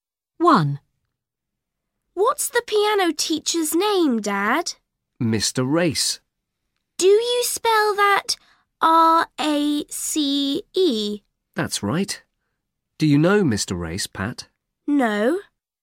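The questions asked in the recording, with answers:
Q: What's the piano teacher's name, Dad?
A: Mr. Race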